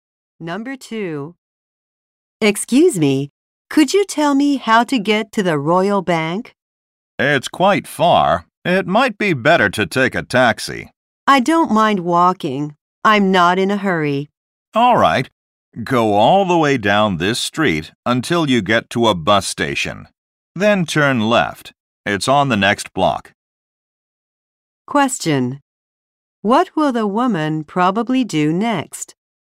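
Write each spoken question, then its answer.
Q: What will the woman probably do next?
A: Walk to the Royal Bank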